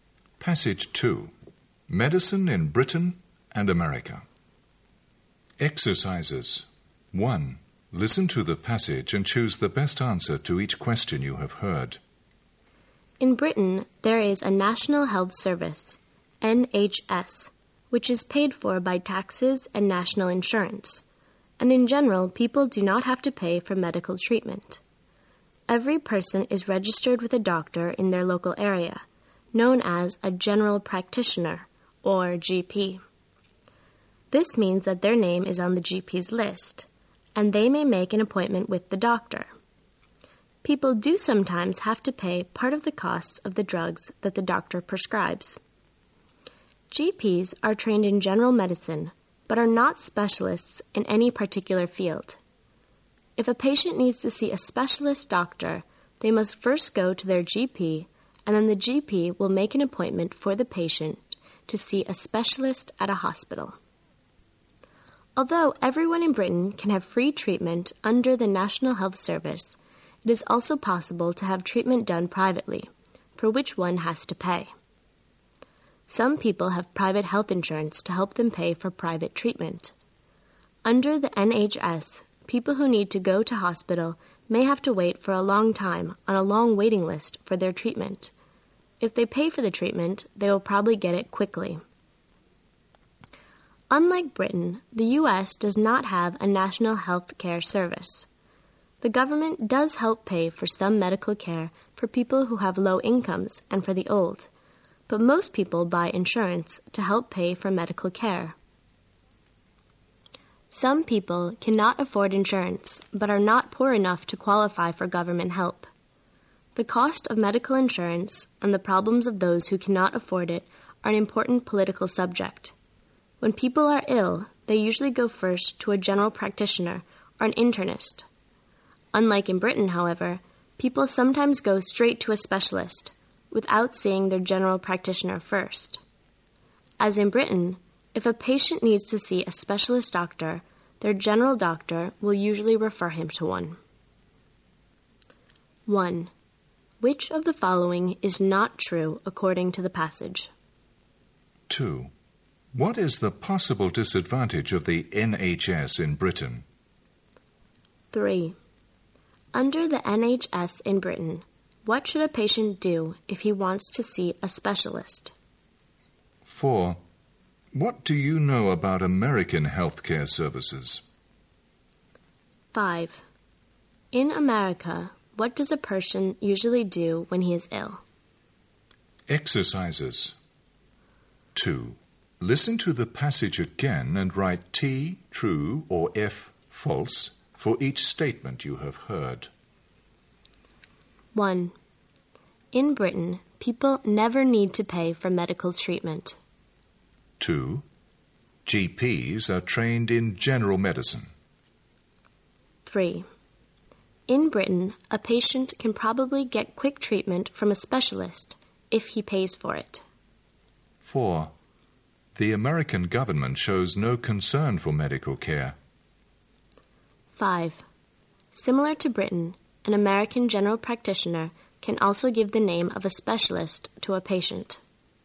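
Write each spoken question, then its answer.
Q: What is the possible disadvantage of the NHS in Britain?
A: People may have to wait a long time on a waiting list for treatment

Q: Under the NHS in Britain, what should a patient do if he wants to see a specialist?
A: Go to his GP first, who will make an appointment with a specialist

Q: In America, what does a person usually do when he is ill?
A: Go first to a general practitioner or an internist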